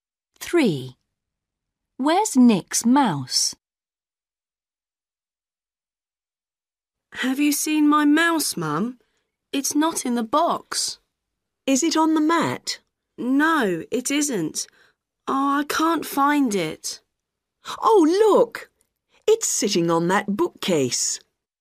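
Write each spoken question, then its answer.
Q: Where's Nick's mouse?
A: on the bookcase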